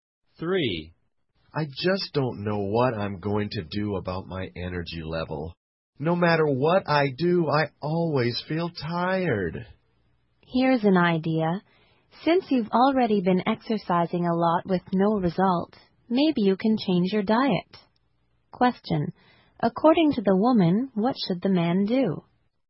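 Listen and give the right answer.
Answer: Change his diet.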